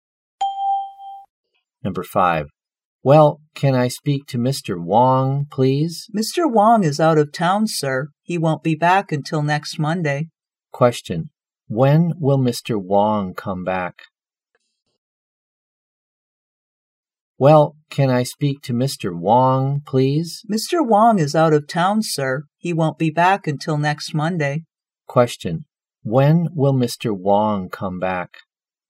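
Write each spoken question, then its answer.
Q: When will Mr. Wong come back?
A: Next Monday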